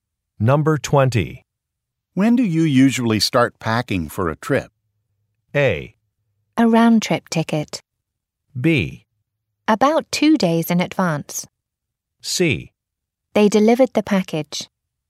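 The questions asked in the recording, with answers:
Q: When do you usually start packing for a trip?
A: B: About 2 days in advance.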